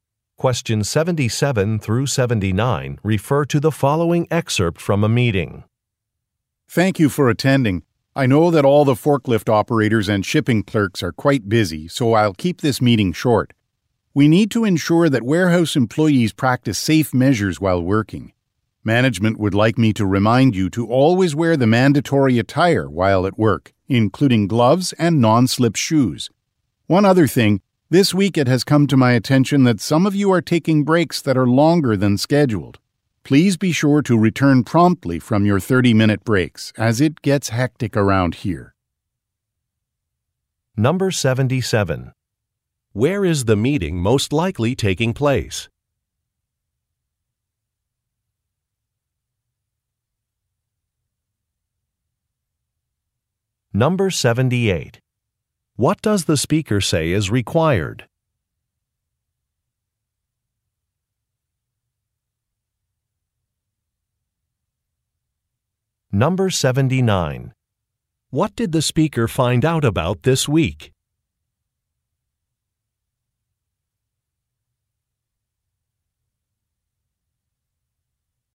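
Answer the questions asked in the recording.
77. In a warehouse
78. Wearing mandatory attire, including gloves and non-slip shoes
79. Some employees are taking breaks longer than scheduled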